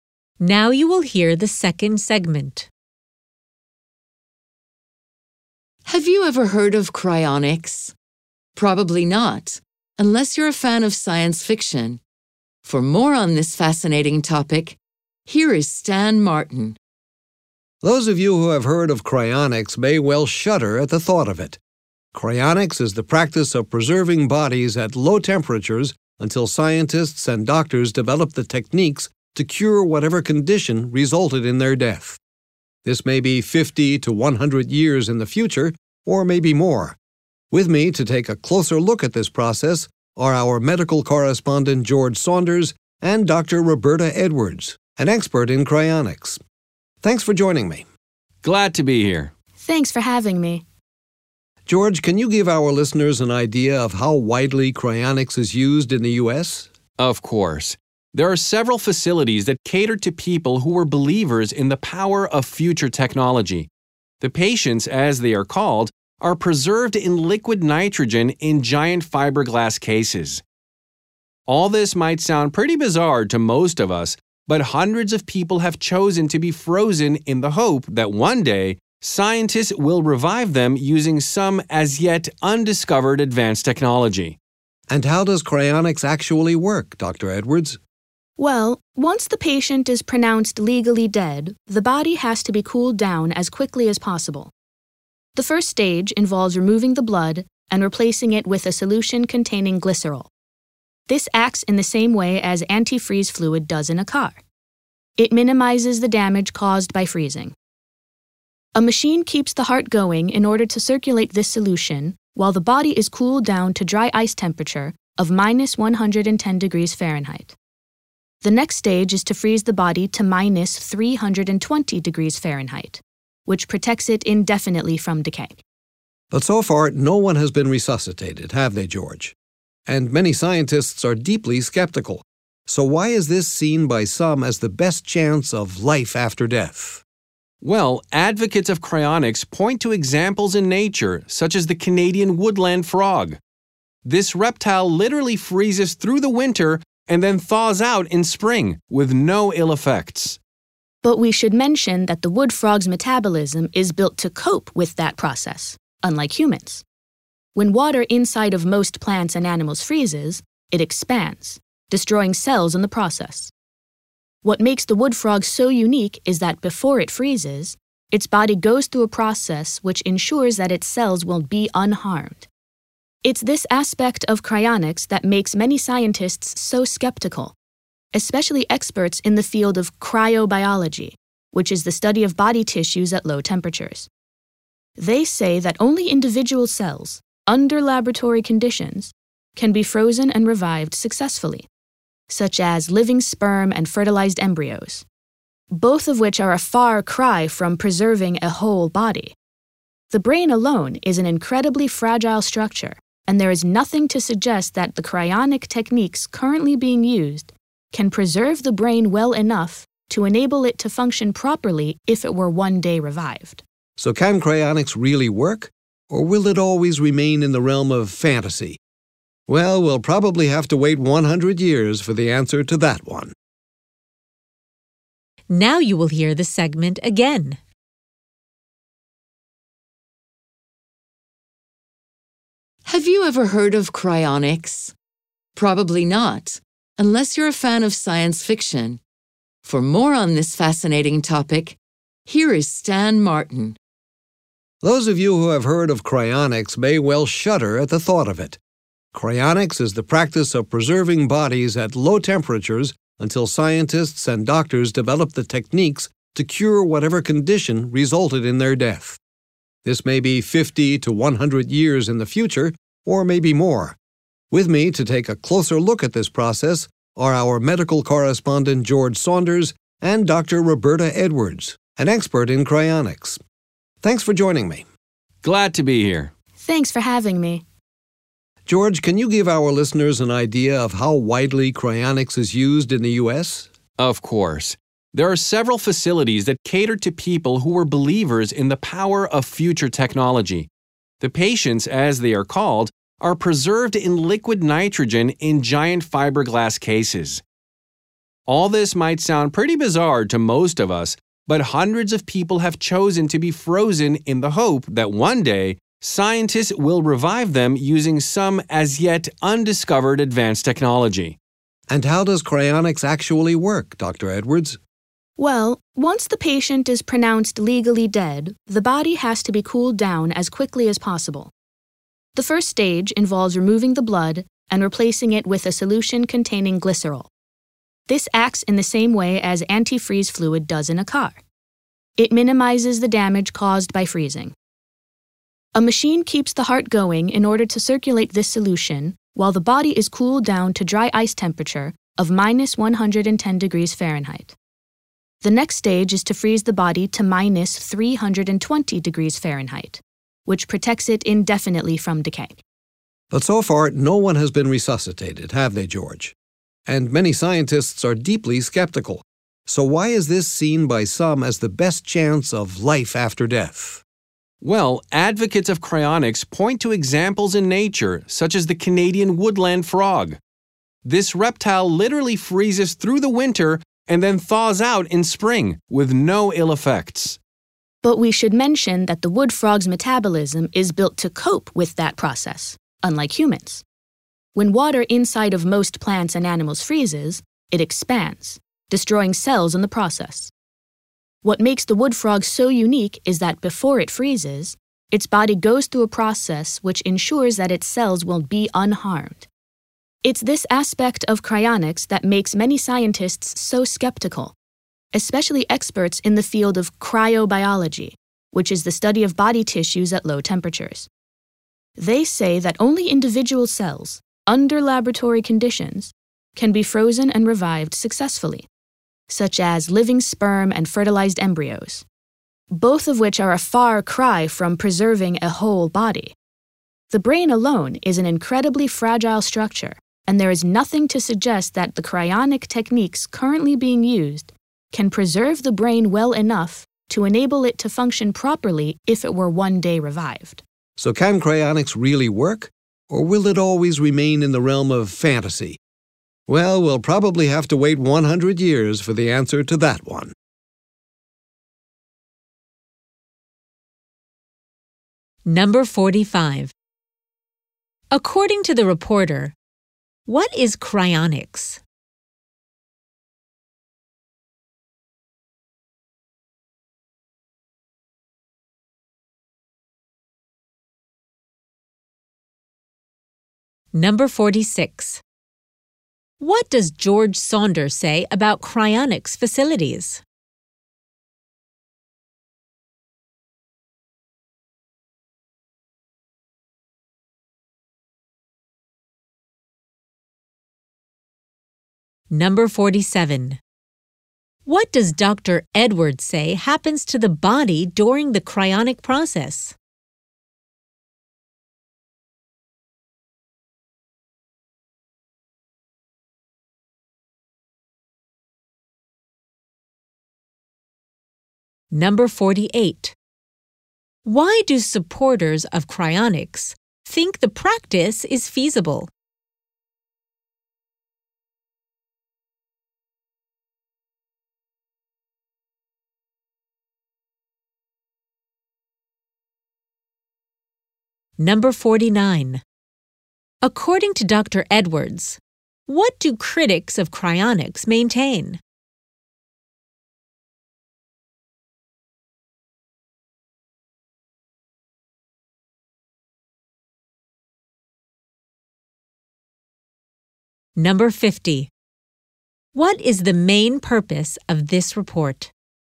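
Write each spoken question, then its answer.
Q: According to the reporter, what is cryonics?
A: Keeping bodies at low temperatures until future medicine can cure what caused the death

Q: What does George Saunders say about cryonics facilities?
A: There are several in the U.S., and hundreds of people are kept frozen in liquid nitrogen there

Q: What does Dr. Edwards say happens to the body during the cryonic process?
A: The blood is replaced with a glycerol solution, then the body is cooled and frozen

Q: Why do supporters of cryonics think the practice is feasible?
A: Examples in nature, such as the wood frog, which freezes and thaws out unharmed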